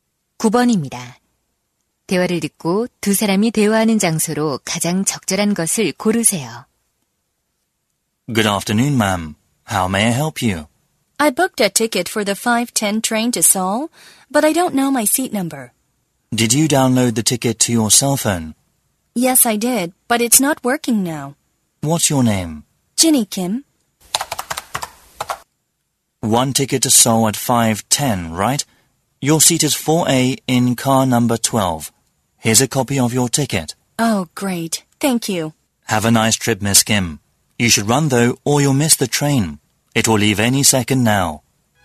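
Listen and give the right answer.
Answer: 기차역 매표소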